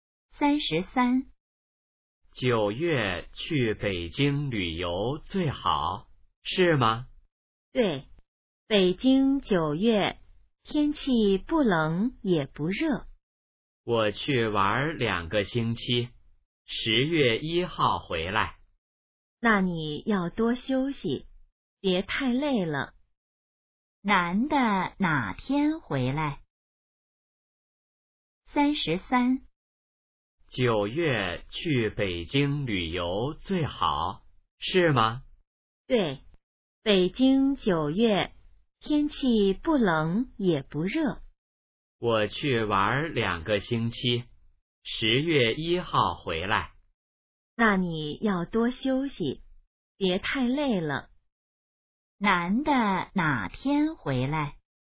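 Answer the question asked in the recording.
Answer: 10月1号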